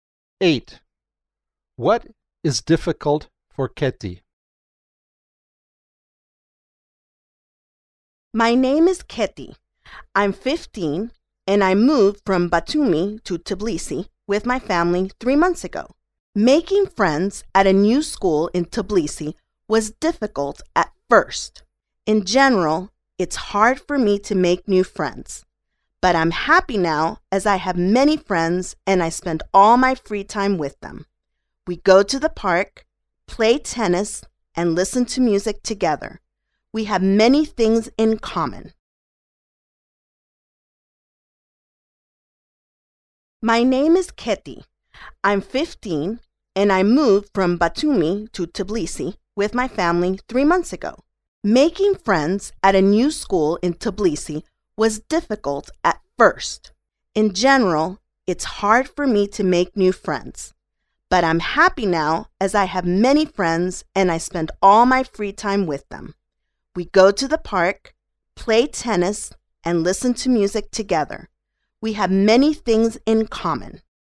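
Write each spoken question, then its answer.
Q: What is difficult for Keti?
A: Making new friends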